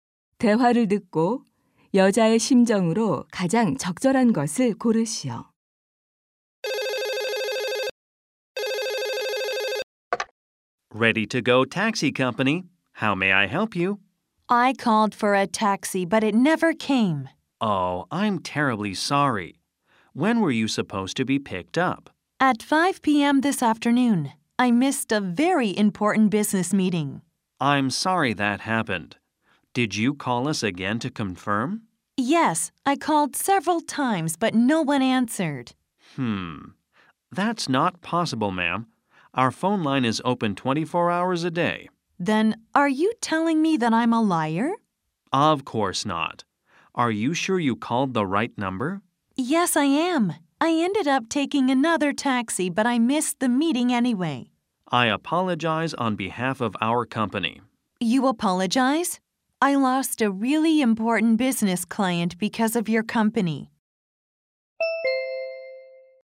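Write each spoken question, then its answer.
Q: 대화를 듣고 여자의 심정으로 가장 적절한 것을 고르시오.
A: 화가 남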